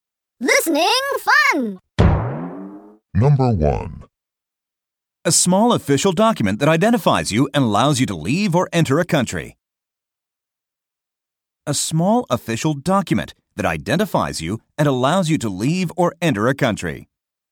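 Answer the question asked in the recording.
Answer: passport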